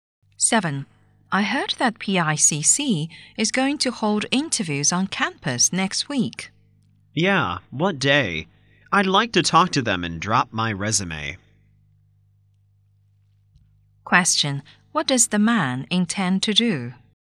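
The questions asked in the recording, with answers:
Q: What does the man intend to do?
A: Talk to PICC at the interviews and hand in his resume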